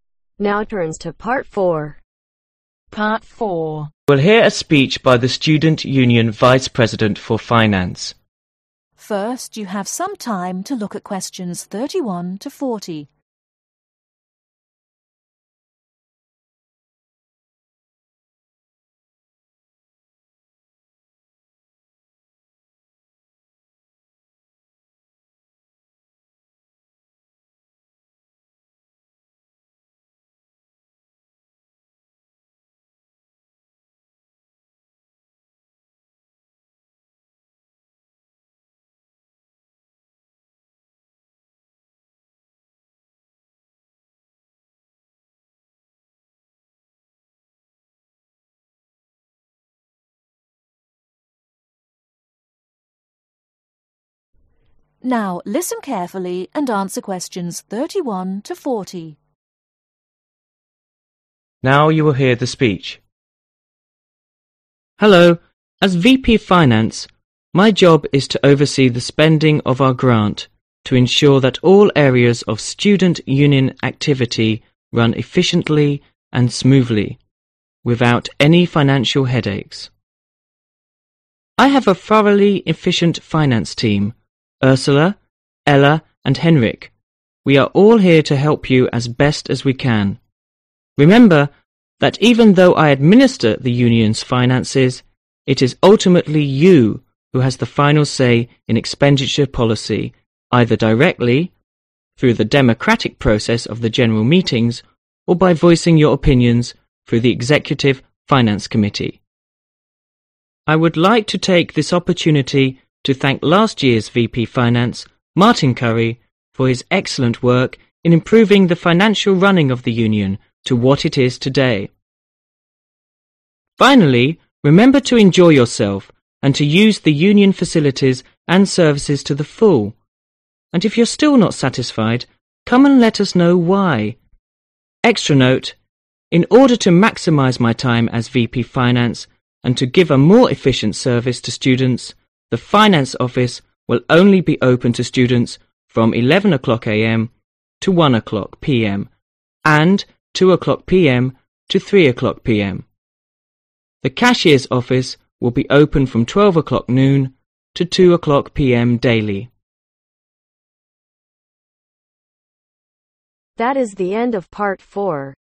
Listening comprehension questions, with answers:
Fill in the gaps numbered 31-35 in the notes below.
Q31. A Vice – president Finance to (31)............ the spending of the Union's grant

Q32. run smoothly without any financial (32)............ .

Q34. We are all hereto help you as (34)............ as we can.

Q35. it is you who have the (35)............ say in expend.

Indicate whether the following statements are true or not by writing A for a statement which is true. B for a statement which is false. C if there is insufficient information.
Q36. The speech is a vice – president's introduction.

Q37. The speech is an election speech.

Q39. The student Union is an organization run by the college.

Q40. The president is a third – years student at Ealing college.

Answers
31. Oversee/Oversees
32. Headaches
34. Best
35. Final
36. true
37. false
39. insufficient information
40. insufficient information